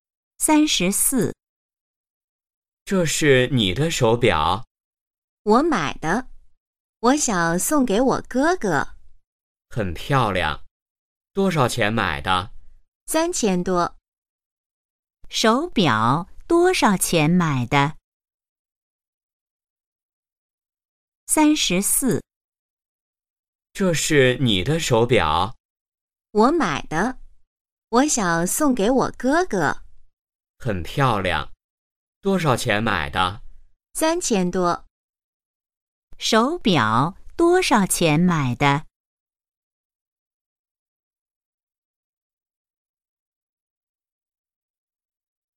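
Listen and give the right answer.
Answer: 3000多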